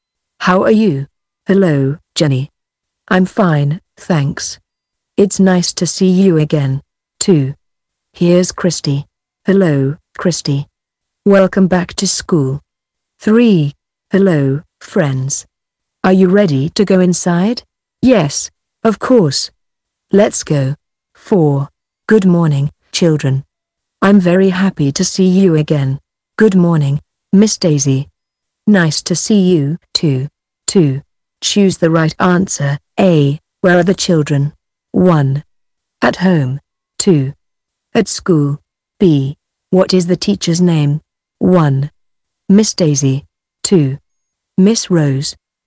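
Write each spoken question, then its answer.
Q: Where are the children?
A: 2: At school.

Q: What is the teacher's name?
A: 1: Miss Daisy.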